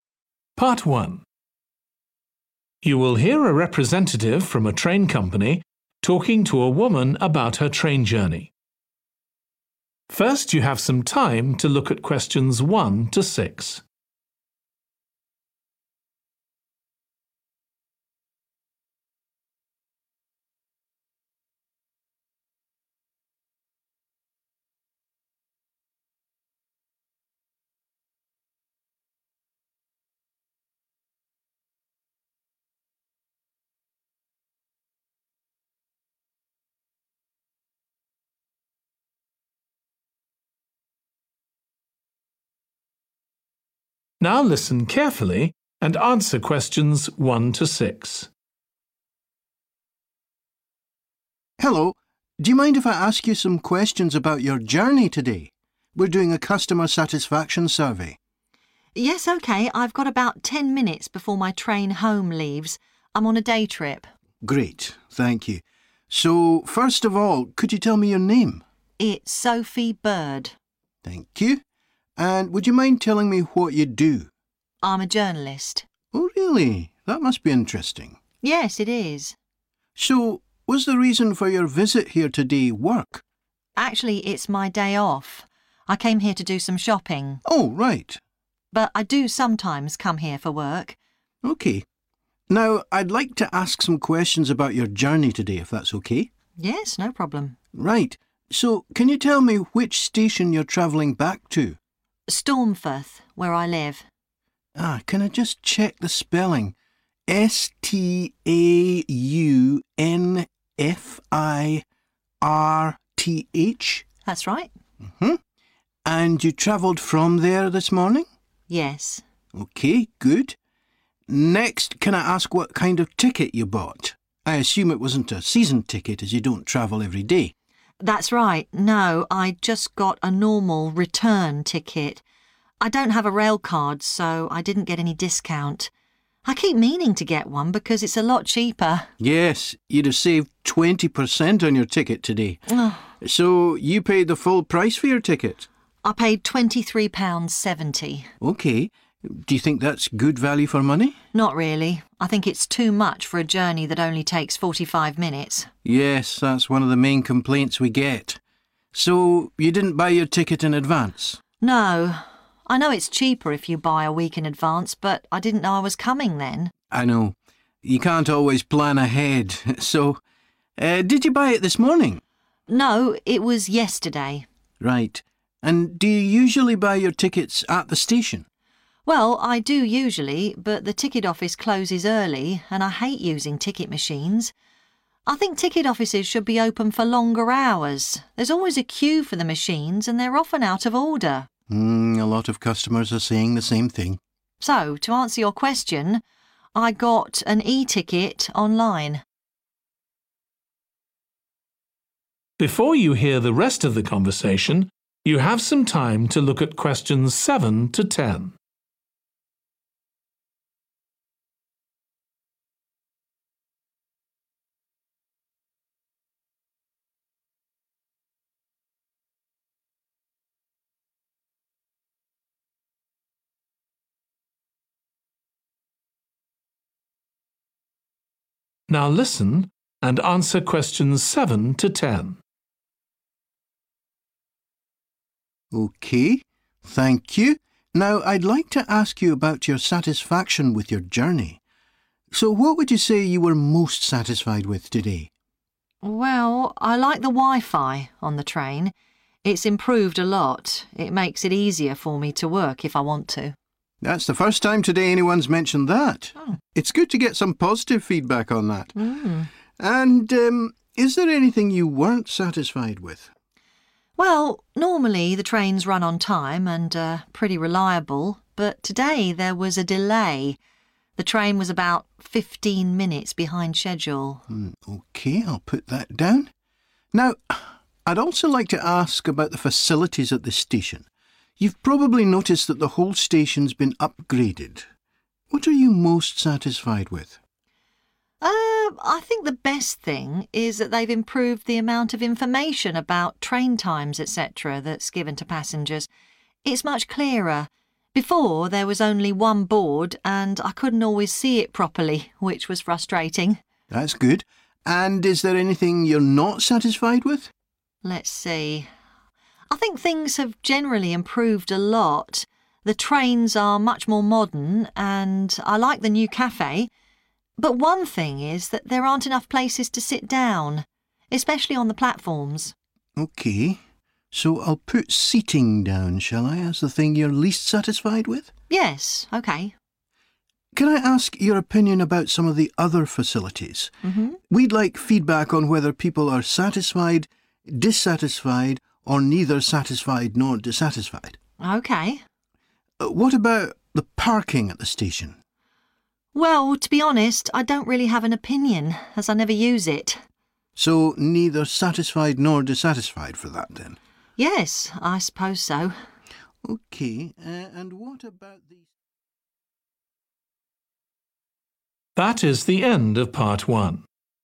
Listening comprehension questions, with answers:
Complete the form below. Write ONE WORD AND/OR A NUMBER for each answer.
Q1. Occupation: 1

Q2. Reason for travel today: 2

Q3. Name of station returning to: 3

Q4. Type of ticket purchased: Standard _____ ticket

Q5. Cost of ticket: £5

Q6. Where ticket was bought: 6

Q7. Least satisfied with: the _____ this morning.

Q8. Most satisfied with: how much _____ was provided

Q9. Least satisfied with: lack of seats, particularly on the 9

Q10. Neither satisfied nor dissatisfied with: the _____ available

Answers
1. journalist
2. shopping
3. Staunfirth
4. return
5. 23.70
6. online
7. delay
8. information
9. platform / platforms
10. parking

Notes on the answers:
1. The transcript says, 'I'm a journalist.' This means the person speaking is someone who writes news stories for newspapers or websites. Answer Explanation: The answer is 'journalist'. This means the person working in the field of writing news. Reason For Correctness: The correct answer is 'journalist' because the person speaking in the excerpt said they are a journalist.
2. The transcript says the customer went shopping today. Answer Explanation: The answer is 'shopping', which means buying things. Reason For Correctness: The correct answer is 'shopping' because the excerpt says the customer came to the station to do some shopping. This means the reason for their travel was shopping.
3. The transcript refers to a place called Staunfirth, which is where the person lives. Answer Explanation: The answer 'Staunfirth' is a place name. Reason For Correctness: The correct answer matches the place mentioned in the excerpt, which is Staunfirth. This shows that the answer aligns with the information provided in the text.
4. The transcript indicates that the person only purchased a standard return ticket for their journey. Answer Explanation: The answer 'return' corresponds to the type of ticket purchased, which in this case is a return ticket. Reason For Correctness: The correct answer aligns with the information provided in the excerpt where the individual mentions they purchased a 'normal return ticket.' This choice fits the context and type of ticket mentioned in the conversation snippet.
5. The transcript mentions that the person paid 23.70 pounds for something. Answer Explanation: The answer shows the amount of money paid, which is 23.70. Reason For Correctness: The correct answer matches the information provided in the excerpt, where it explicitly states 'I paid £23.70.' Therefore, the answer 23.70 is correct as it represents the cost specified in the text.
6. The transcript mentions that the person received their ticket through the internet. Answer Explanation: The answer means the ticket was obtained through the internet. Reason For Correctness: The correct answer aligns with the information provided in the transcript where it states 'I got an e-ticket online.' This shows that the ticket was purchased using an online platform or website.
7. The transcript tells us that the trains are usually on time and reliable, but on this particular day, there was a delay, which means the train did not arrive or depart as scheduled. Answer Explanation: The answer refers to a situation where something is running later than planned. Reason For Correctness: The correct answer 'delay' is appropriate because it matches the situation described in the excerpt where the trains were reliable except for that specific day when there was a delay, causing inconvenience to the traveler.
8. The transcript mentions that the amount of information provided to passengers about train times has been improved, indicating a positive change. Answer Explanation: The answer 'information' refers to details or data given to passengers about train times, which has been praised in the excerpt. Reason For Correctness: The correct answer is 'information' because it directly relates to the improved details about train times mentioned in the excerpt, showing that the passenger found this positive change to be beneficial.
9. The transcript mentions that there are not enough seats to sit down, especially on the platforms. Answer Explanation: The answer means the raised flat areas where you wait for trains or buses. It refers to the parts of the station where passengers stand while waiting for transportation. Reason For Correctness: The correct answer 'platform' is appropriate because it matches the description in the excerpt where the speaker talks about the lack of seating, specifically on the platforms, which are indeed the designated areas at a station where people wait for their trains or buses.
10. The transcript is asking about how the person felt about the parking at the station. Answer Explanation: The answer says that the person was not satisfied with the parking at the station. Reason For Correctness: The correct answer is "parking" because the excerpt asks about the person's satisfaction with the parking at the station, and the answer states that the person was not satisfied with it.

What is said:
MAN: Hello. Do you mind if I ask you some questions about your journey today? We're doing a customer satisfaction survey.
SOPHIE: Yes. OK. I've got about ten minutes before my train home leaves. I'm on a day trip.
MAN: Great. Thank you. So first of all, could you tell me your name?
SOPHIE: It's Sophie Bird.
MAN: Thank you. And would you mind telling me what you do?
SOPHIE: I'm a journalist.
MAN: Oh really? That must be interesting.
SOPHIE: Yes. It is.
MAN: So was the reason for your visit here today work?
SOPHIE: Actually, it's my day off. I came here to do some shopping.
MAN: On right.
SOPHIE: But I do sometimes come here for work.
MAN: OK. Now I'd like to ask some questions about your journey today, if that's OK.
SOPHIE: Yes. No problem.
MAN: Right, so can you tell me which station you're travelling back to?
SOPHIE: Staunfirth, where I live.
MAN: Can I just check the spelling? S-T-A-U-N-F-I-R-T-H?
SOPHIE: That's right.
MAN: And you travelled from there this morning?
SOPHIE: Yes.
MAN: OK, good. Next, can I ask what kind of ticket you bought? I assume it wasn't a season ticket, as you don't travel every day.
SOPHIE: That's right. No, I just got a normal return ticket. I don't have a rail card so I didn't get any discount. I keep meaning to get one because it's a lot cheaper.
MAN: Yes – you'd have saved 20% on your ticket today. So you paid the full price for your ticket?
SOPHIE: I paid £23.70.
MAN: OK. Do you think that's good value for money?
SOPHIE: Not really. I think it's too much for a journey that only takes 45 minutes.
MAN: Yes, that's one of the main complaints we get. So, you didn't buy your ticket in advance?
SOPHIE: No. I know it's cheaper if you buy a week in advance but I didn't know I was coming then.
MAN: I know. You can't always plan ahead. So, did you buy it this morning?
SOPHIE: No, it was yesterday.
MAN: Right. And do you usually buy your tickets at the station?
SOPHIE: Well, I do usually but the ticket office closes early and I hate using ticket machines. I think ticket offices should be open for longer hours. There's always a queue for the machines and they're often out of order.
MAN: A lot of customers are saying the same thing.
SOPHIE: So to answer your question ... I got an e-ticket online.
MAN: OK. Thank you. Now I'd like to ask you about your satisfaction with your journey. So what would you say you were most satisfied with today?
SOPHIE: Well, I like the wifi on the train. It's improved a lot. It makes it easier for me to work if I want to.
MAN: That's the first time today anyone's mentioned that. It's good to get some positive feedback on that.
MAN: And, is there anything you weren't satisfied with?
SOPHIE: Well, normally, the trains run on time and are pretty reliable but today there was a delay; the train was about 15 minutes behind schedule.
MAN: OK. I'll put that down. Now I'd also like to ask about the facilities at this station. You've probably noticed that the whole station's been upgraded. What are you most satisfied with?
SOPHIE: I think the best thing is that they've improved the amount of information about train times etc. that's given to passengers – it's much clearer – before there was only one board and I couldn't always see it properly – which was frustrating.
MAN: That's good. And is there anything you're not satisfied with?
SOPHIE: Let's see ... I think things have generally improved a lot. The trains are much more modern and I like the new café. But one thing is that there aren't enough places to sit down, especially on the platforms.
MAN: OK – so I'll put 'seating' down, shall I, as the thing you're least satisfied with?
SOPHIE: Yes, OK.
MAN: Can I ask your opinion about some of the other facilities? We'd like feedback on whether people are satisfied, dissatisfied or neither satisfied nor dissatisfied.
SOPHIE: OK.
MAN: What about the parking at the station?
SOPHIE: Well to be honest, I don't really have an opinion as I never use it.
MAN: So, neither satisfied nor dissatisfied for that then.
SOPHIE: Yes, I suppose so ...
MAN: OK, and what about ...?